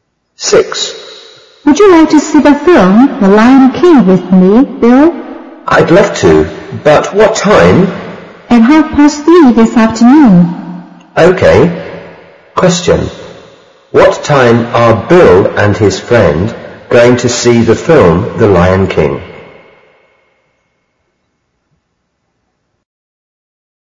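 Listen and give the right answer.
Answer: At 3:30 this afternoon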